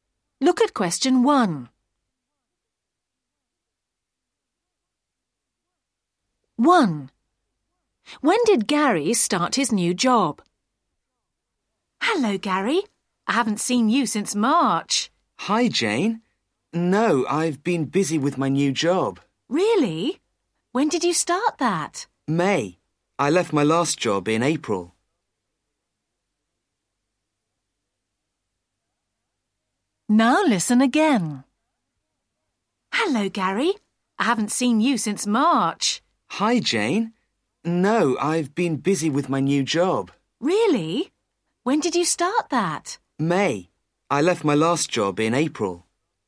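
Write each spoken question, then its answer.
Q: When did Gary start his new job?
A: May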